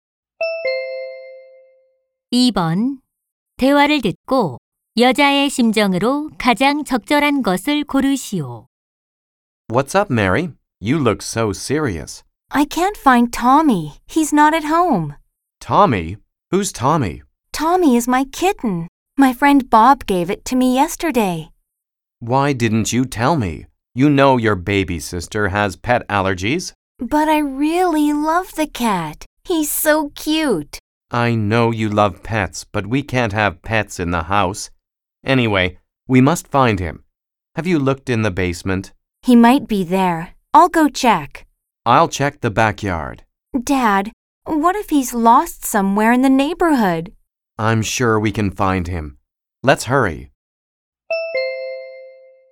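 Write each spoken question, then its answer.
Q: 대화를 듣고 여자의 심정으로 가장 적절한 것을 고르시오.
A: 걱정스러움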